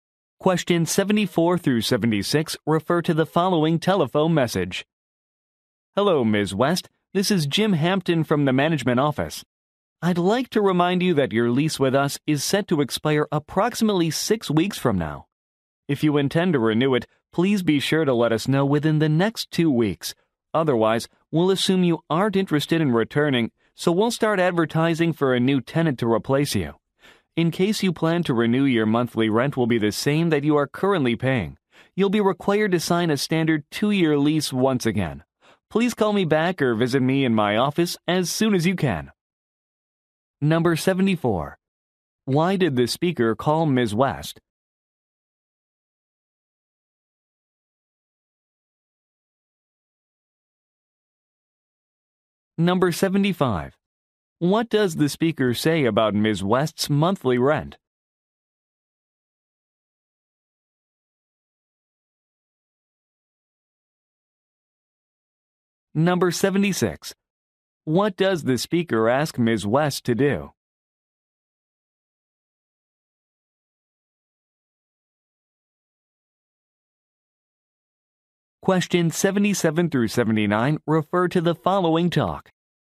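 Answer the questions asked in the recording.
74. To remind her that her lease will expire soon
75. It will stay the same if she renews
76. Call him back or visit his office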